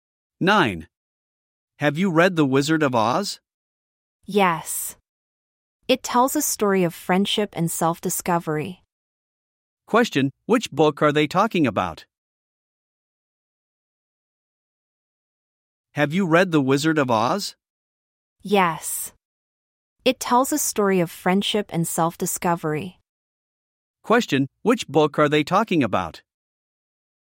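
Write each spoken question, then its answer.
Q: Question, which book are they talking about?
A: The Wizard of Oz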